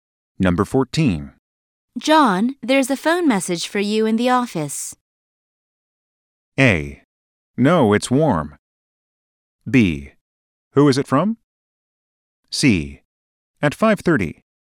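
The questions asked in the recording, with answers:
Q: John, there's a phone message for you in the office.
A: B: Who is it from?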